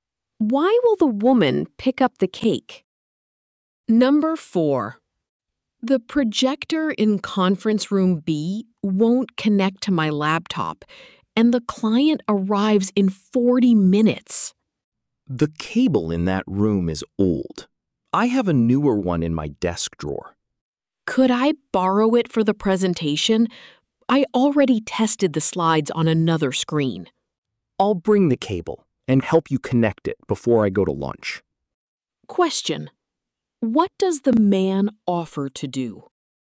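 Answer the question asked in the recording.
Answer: Bring his newer cable and help connect it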